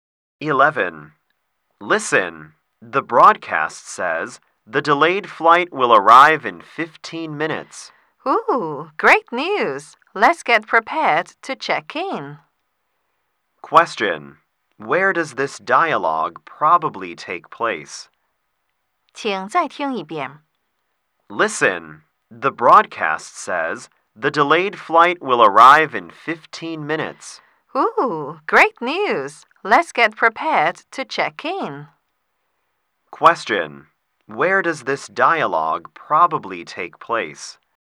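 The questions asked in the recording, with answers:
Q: Where does this dialogue probably take place?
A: At an airport.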